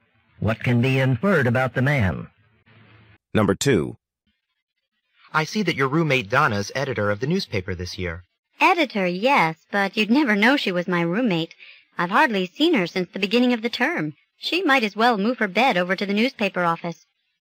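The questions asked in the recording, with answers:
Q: What can be inferred about Donna?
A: She spends almost all her time at the newspaper office.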